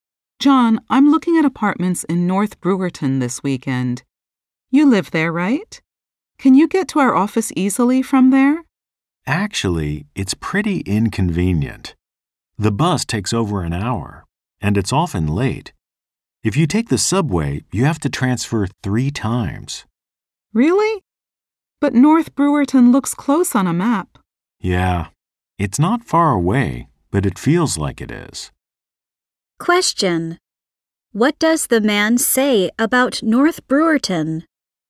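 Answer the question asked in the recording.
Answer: Getting to the office from there is inconvenient: the bus takes over an hour and the subway needs 3 transfers.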